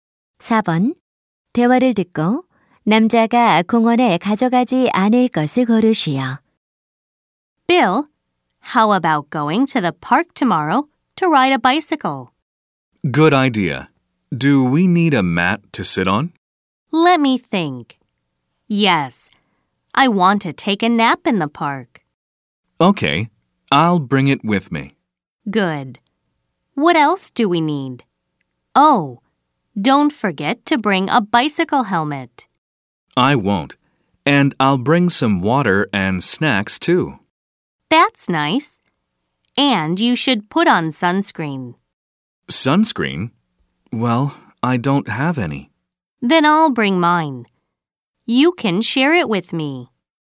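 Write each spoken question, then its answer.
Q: 대화를 듣고 남자가 공원에 가져가지 않을 것을 고르시오.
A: 선크림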